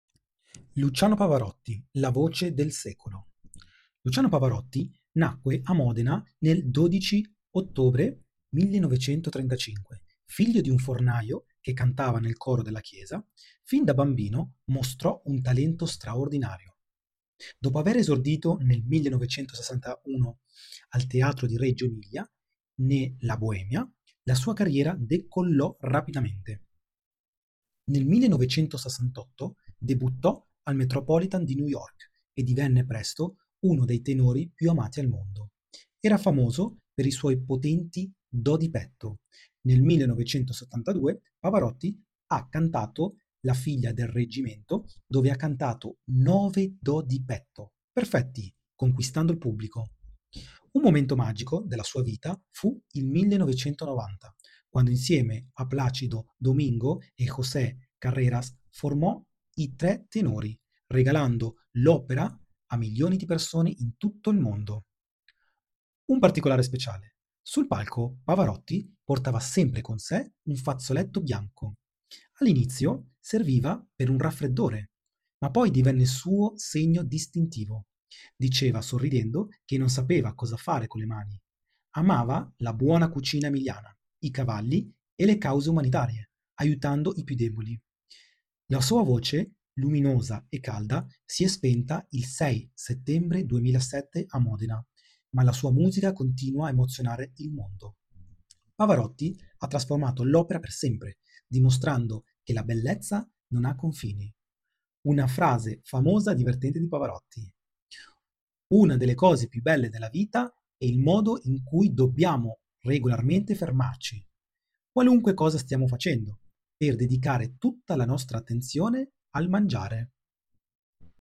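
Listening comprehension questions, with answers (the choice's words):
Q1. Qual era il mestiere del padre di Luciano Pavarotti?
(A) Un cantante lirico professionista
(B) Un fornaio che cantava nel coro della chiesa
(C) Un sarto di Modena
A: Un fornaio che cantava nel coro della chiesa

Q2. In quale opera Pavarotti ha esordito nel 1961 a Reggio Emilia?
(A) La Bohème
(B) La figlia del reggimento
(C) Tosca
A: La Bohème

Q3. Per quale record vocale è rimasta famosa la sua esibizione del 1972 a New York?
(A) Ha tenuto una nota per oltre 30 secondi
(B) Ha cantato 9 "do di petto" perfetti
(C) Ha cantato interamente senza spartito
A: Ha cantato 9 "do di petto" perfetti

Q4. Chi faceva parte dei "Tre Tenori" insieme a Pavarotti?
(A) Andrea Bocelli e Caruso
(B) Plácido Domingo e José Carreras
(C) Claudio Villa e Domenico Modugno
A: Plácido Domingo e José Carreras

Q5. Perché Pavarotti portava sempre un fazzoletto bianco sul palco?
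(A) All'inizio per un raffreddore, poi perché non sapeva cosa fare con le mani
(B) Era un regalo portafortuna di sua madre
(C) Lo usava per asciugare il sudore a fine esibizione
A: All'inizio per un raffreddore, poi perché non sapeva cosa fare con le mani

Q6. Oltre alla musica, quali erano le grandi passioni di Pavarotti menzionate nel testo?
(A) Il calcio, le auto sportive e la pittura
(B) La buona cucina emiliana, i cavalli e le cause umanitarie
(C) I viaggi, il giardinaggio e la collezione di cappelli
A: La buona cucina emiliana, i cavalli e le cause umanitarie

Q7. Secondo la famosa e divertente frase di Pavarotti, a cosa dobbiamo dedicare tutta la nostra attenzione regolarmente?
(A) Al canto e alla musica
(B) All'aiuto verso i più deboli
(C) Al mangiare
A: Al mangiare

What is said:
Luciano Pavarotti nacque a Modena il 12 ottobre 1935. Figlio di un fornaio che cantava nel coro della chiesa.Fin da bambino mostrò un talento straordinario. 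Dopo aver esordito nel 1961 al Teatro di Reggio Emilia ne La Bohème, la sua carriera decollò rapidamente.
Nel 1968 debuttò al Metropolitan di New York e divenne presto uno dei tenori più amati al mondo. Era famoso per i suoi potenti "do di petto": nel 1972, Pavarotti ha cantato La figlia del reggimento, dove ha cantato " 9 do di petto" perfetti, conquistando il pubblico.
Un momento magico della sua vita fu il 1990, quando insieme a Plácido Domingo e José Carreras formò i Tre Tenori, regalando l'opera a milioni di persone in tutto il mondo.
Un particolare speciale
Sul palco, Pavarotti portava sempre con sé un fazzoletto bianco. All'inizio serviva per un raffreddore, ma divenne il suo segno distintivo. Diceva sorridendo che non sapeva cosa fare con le mani. Amava la buona cucina emiliana, i cavalli e le cause umanitarie, aiutando i piu' deboli. La sua voce luminosa e calda si e' spenta il 6 settembre 2007 a Modena, ma la sua musica continua a emozionare il mondo.
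Pavarotti ha trasformato l'opera per sempre, dimostrando che la bellezza non ha confini. Una frase famosa e divertente di Pavarotti:
" Una delle cose più belle della vita è il modo in cui dobbiamo regolarmente fermarci, qualunque cosa stiamo facendo, per dedicare tutta la nostra attenzione al mangiare".
Pavarotti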